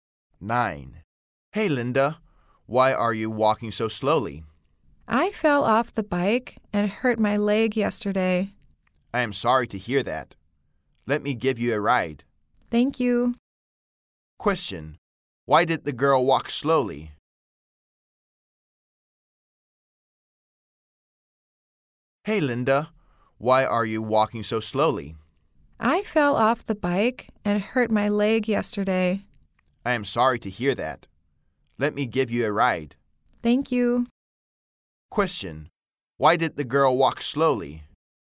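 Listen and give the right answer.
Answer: She fell off the bike and hurt her leg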